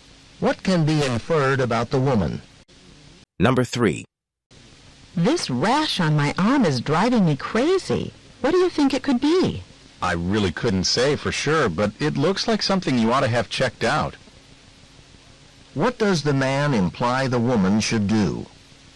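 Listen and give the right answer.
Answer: See a doctor about the rash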